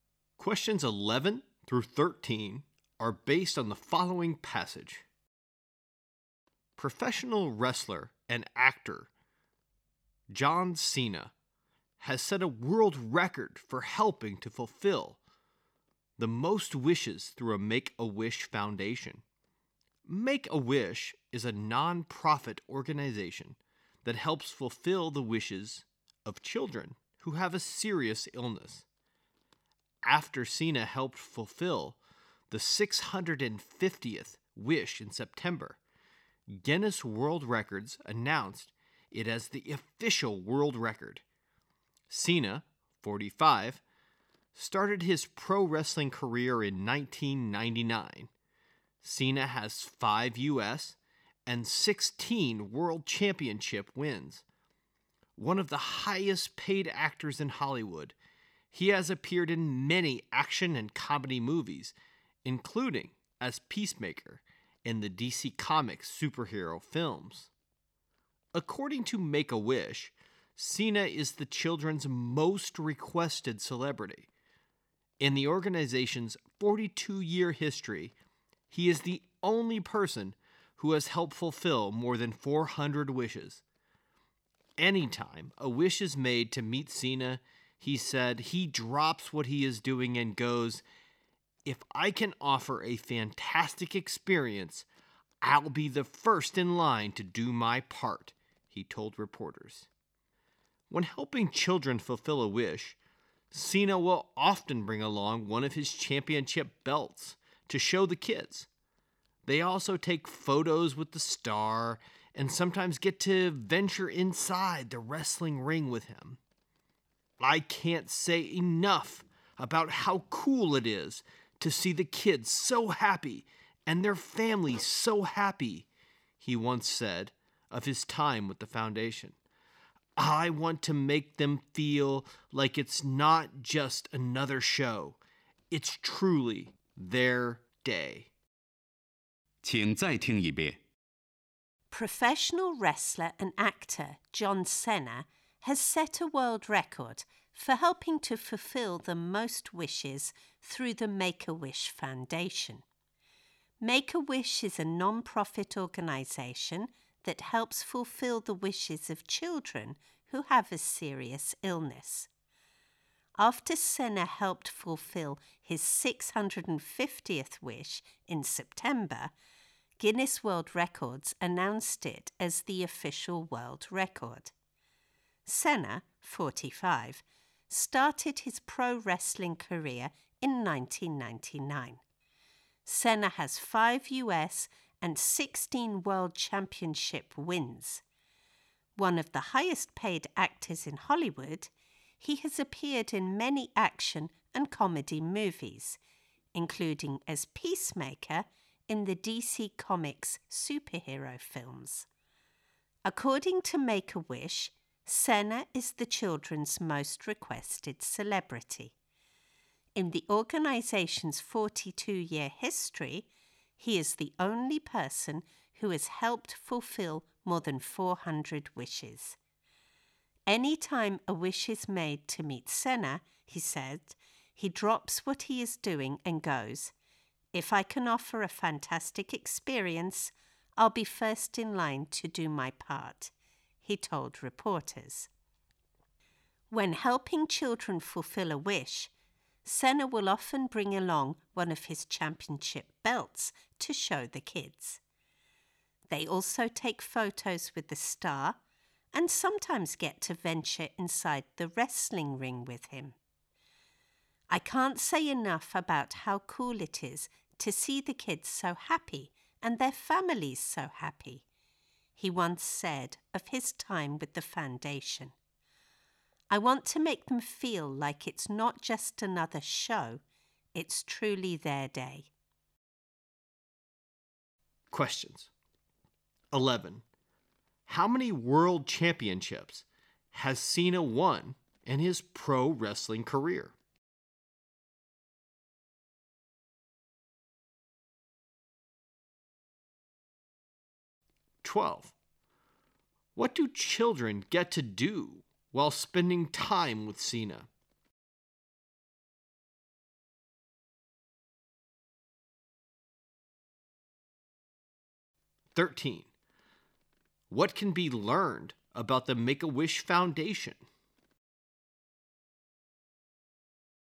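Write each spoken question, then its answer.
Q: How many world championships has Cena won in his pro wrestling career?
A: 16

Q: What do children get to do while spending time with Cena?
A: See his championship belts, take photos with him and sometimes go inside the wrestling ring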